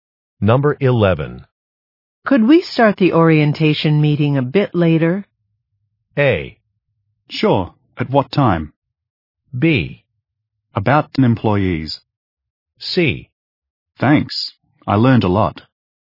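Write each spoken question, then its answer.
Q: Could we start the orientation meeting a bit later?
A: A: Sure. At what time?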